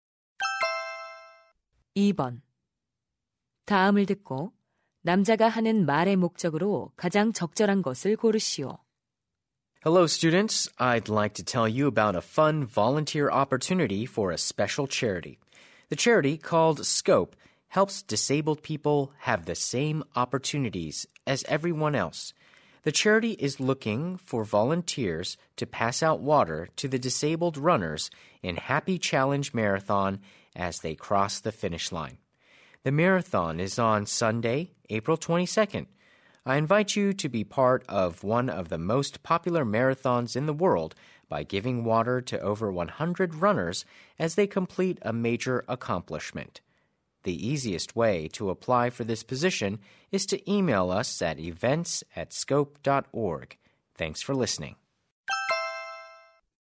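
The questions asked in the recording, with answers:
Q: 다음을 듣고 남자가 하는 말의 목적으로 가장 적절한 것을 고르시오.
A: 자선 단체 마라톤 자원봉사자를 모집하려고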